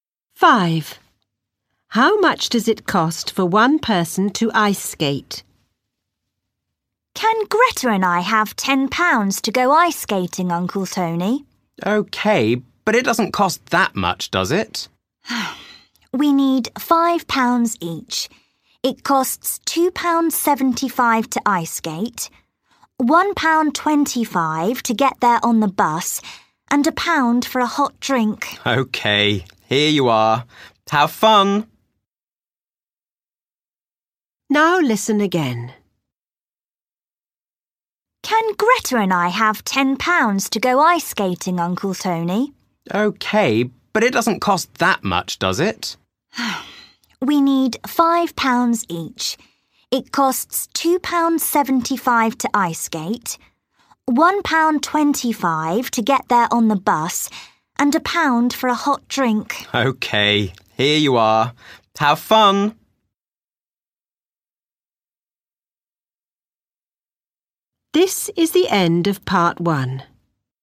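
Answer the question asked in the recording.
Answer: £2.75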